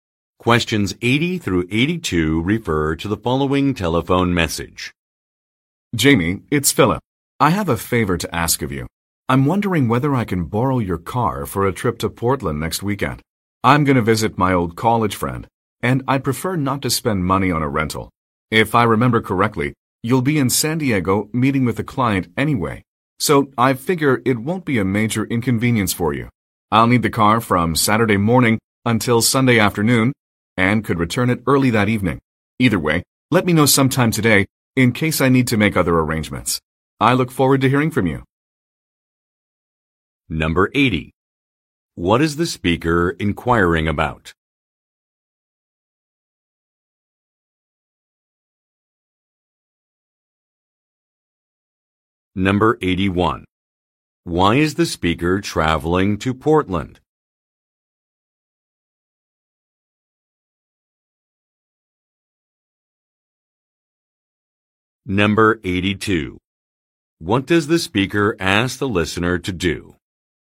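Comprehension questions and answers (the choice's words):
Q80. What is the speaker inquiring about?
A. Whether a client is in town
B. How much an upgrade will cost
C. If he can use a vehicle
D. When a trip will end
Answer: If he can use a vehicle

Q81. Why is the speaker traveling to Portland?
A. To arrange an event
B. To visit a friend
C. To attend a conference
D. To tour a college campus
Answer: To visit a friend

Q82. What does the speaker ask the listener to do?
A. Make a decision known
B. Contact a rental company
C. Return a car before Sunday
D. Drive to Portland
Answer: Make a decision known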